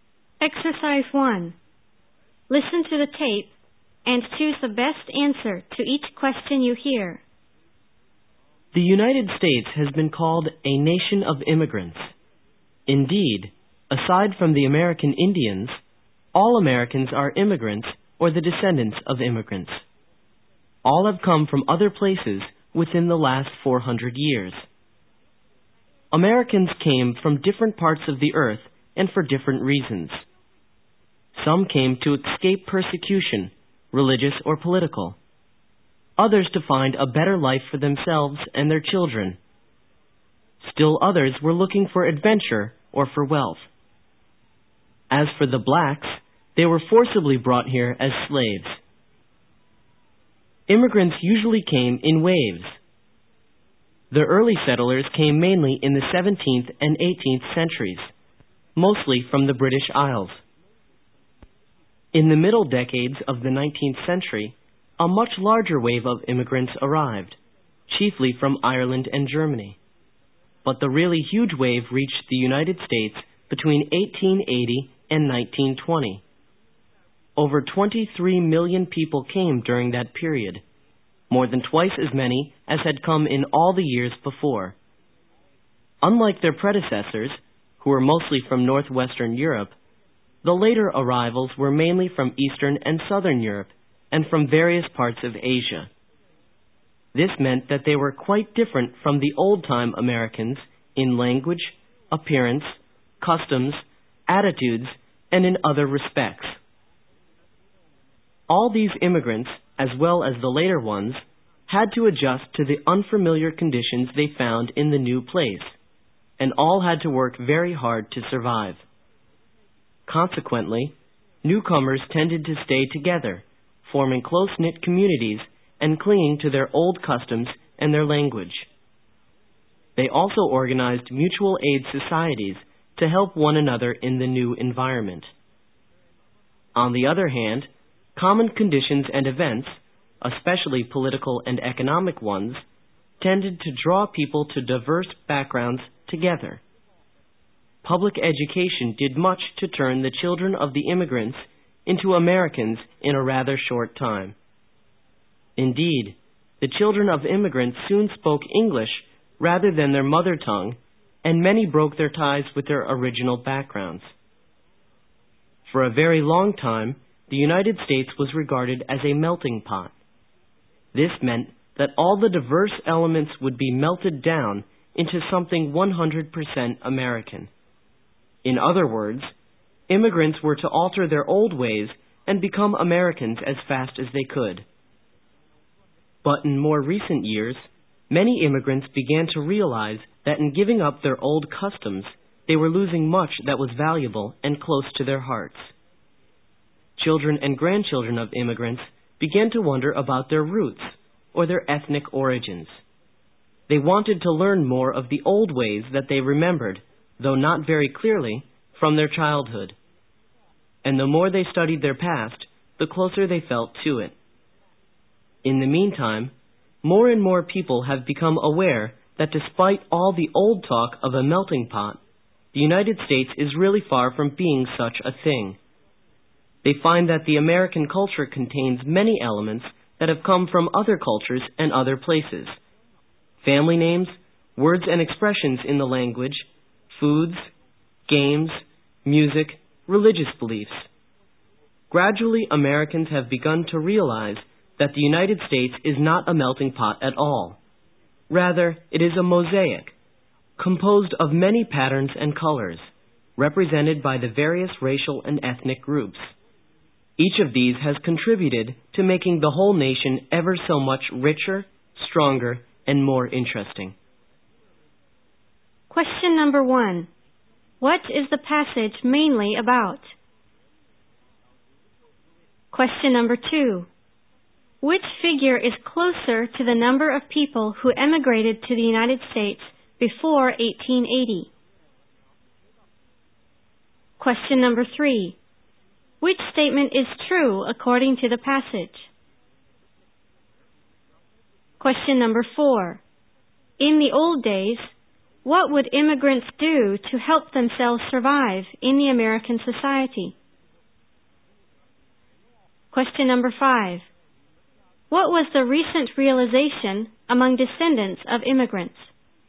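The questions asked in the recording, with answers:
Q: What is the passage mainly about?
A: Immigrants in the United States: the US is a mosaic, not a melting pot

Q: In the old days, what would immigrants do to help themselves survive in the American society?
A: Stay together in close-knit communities and organize mutual aid societies

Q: What was the recent realization among descendants of immigrants?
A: That by giving up their old customs they were losing something valuable; they wanted to learn about their roots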